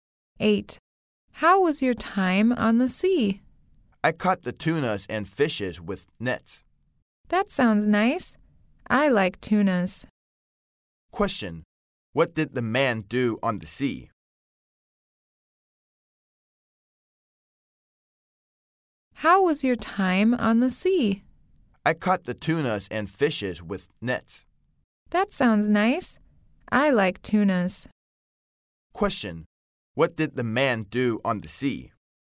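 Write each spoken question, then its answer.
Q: What did the man do on the sea?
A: He caught tunas and fish with nets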